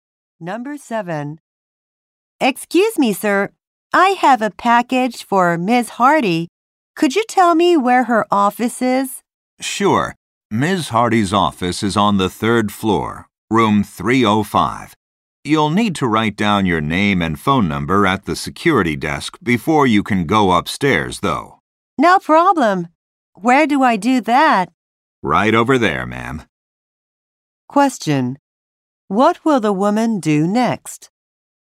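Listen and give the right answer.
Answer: Write her name and phone number at the security desk.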